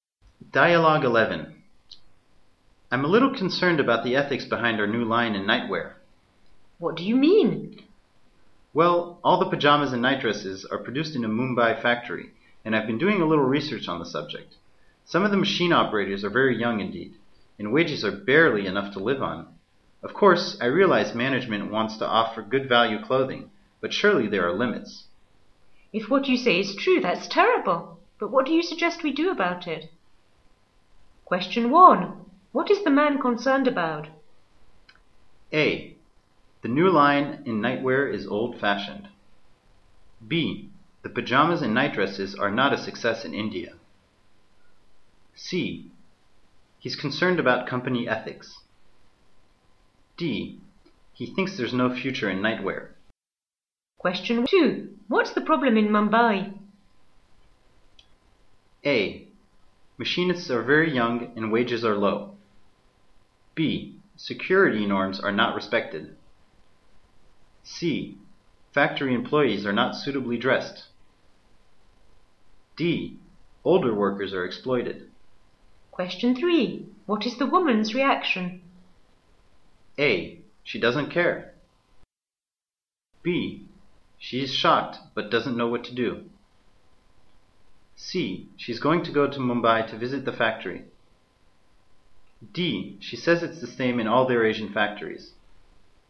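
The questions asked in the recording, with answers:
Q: What is the man concerned about?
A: C: He's concerned about company ethics.

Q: What's the problem in Mumbai?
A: A: Machinists are very young and wages are low.

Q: What is the woman's reaction?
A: B: She is shocked but doesn't know what to do.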